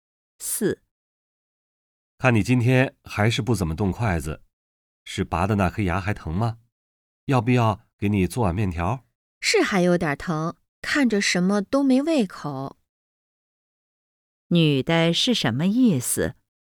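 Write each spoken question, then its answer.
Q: 女的是什么意思?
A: 牙还有点疼,没胃口,什么都不想吃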